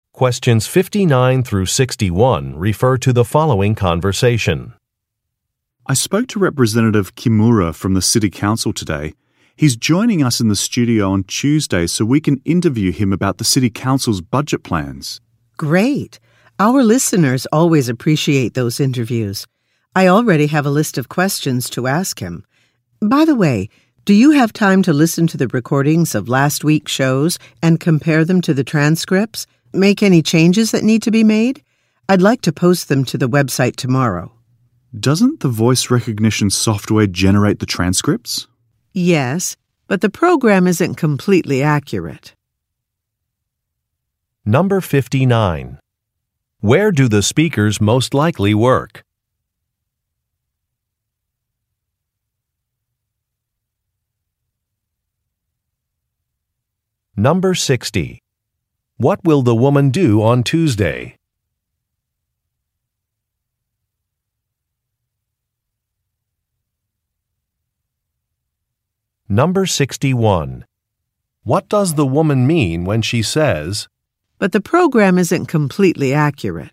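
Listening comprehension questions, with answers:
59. Where do the speakers most likely work?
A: At a radio station

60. What will the woman do on Tuesday?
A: Conduct an interview

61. What does the woman mean when she says, "but the program isn't completely accurate"?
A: Some transcripts should be checked.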